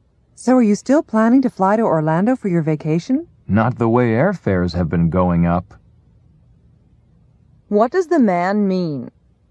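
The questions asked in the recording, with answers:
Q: What does the man mean?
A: He probably won't fly to Orlando because airfares are too high.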